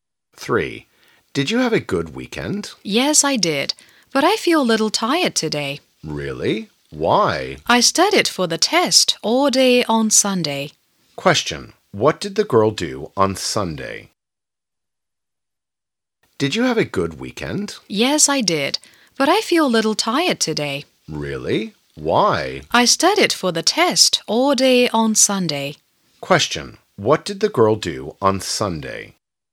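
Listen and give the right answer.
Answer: She studied for the test all day.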